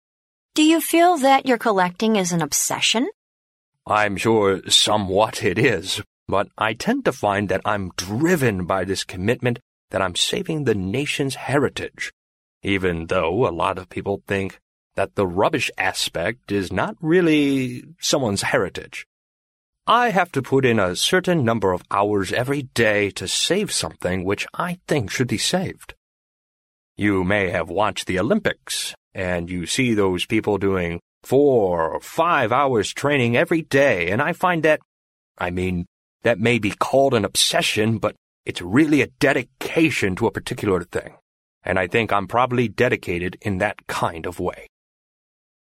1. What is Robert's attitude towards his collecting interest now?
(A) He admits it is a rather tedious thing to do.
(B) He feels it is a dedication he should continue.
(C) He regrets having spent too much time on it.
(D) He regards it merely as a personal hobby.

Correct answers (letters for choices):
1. B

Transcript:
W: Do you feel that your collecting is an obsession?
M: Er, I'm sure somewhat it is but I tend to find that I'm driven by this commitment that I'm saving the nation's heritage, even though a lot of people think that the rubbish aspect is not really someone's heritage. I have to put in a certain number of hours every day to save something which I think should be saved. You may have watched the Olympics and you see those people doing four or five hours training every day and I find that, I mean, that may be called an obsession but it's really a dedication to a particular thing and I think I'm probably dedicated in that kind of way.

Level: C类